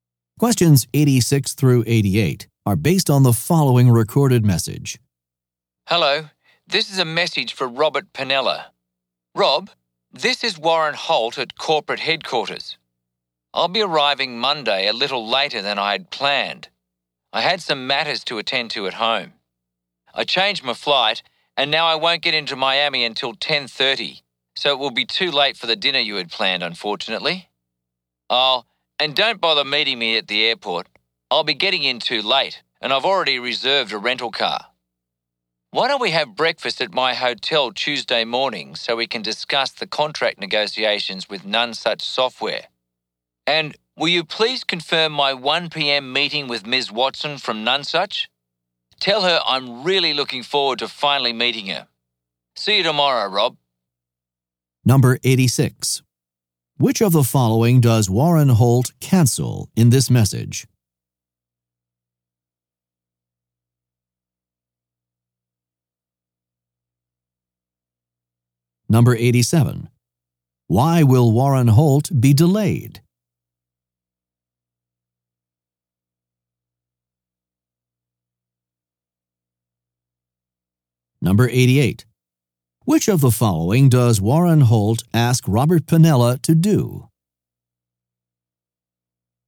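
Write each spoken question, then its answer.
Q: Why will Warren Holt be delayed?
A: He had some matters to attend to at home

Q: Which of the following does Warren Holt ask Robert Pinella to do?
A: Confirm his 1 p.m. meeting with Ms. Watson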